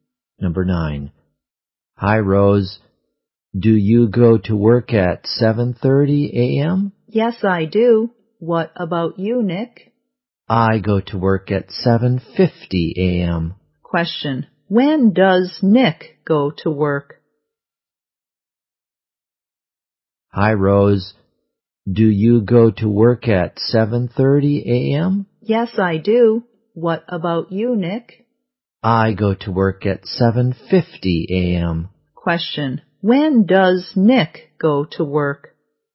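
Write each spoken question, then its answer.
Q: When does Nick go to work?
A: At 7:50 a.m.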